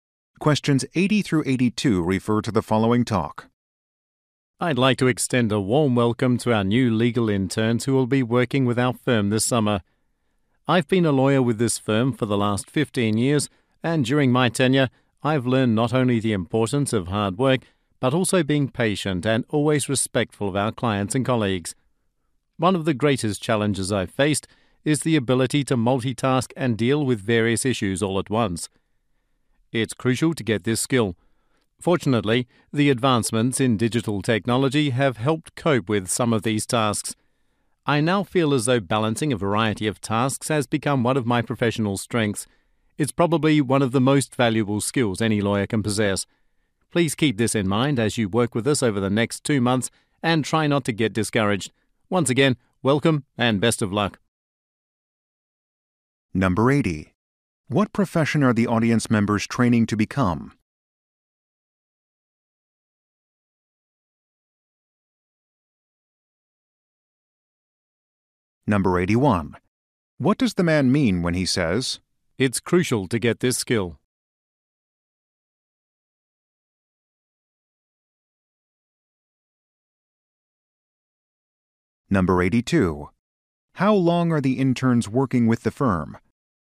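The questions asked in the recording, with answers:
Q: What profession are the audience members training to become?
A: Lawyers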